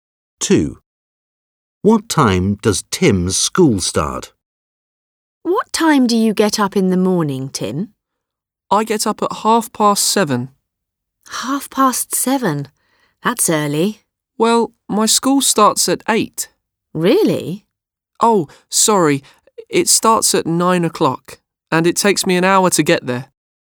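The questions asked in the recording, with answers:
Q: What time does Tim's school start?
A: 9 o'clock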